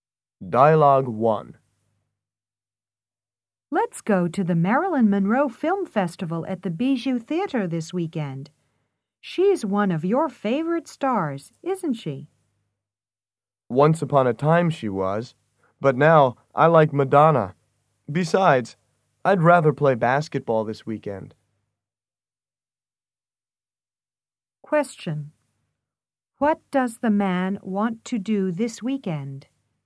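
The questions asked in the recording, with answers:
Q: What does the man want to do this weekend?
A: Play basketball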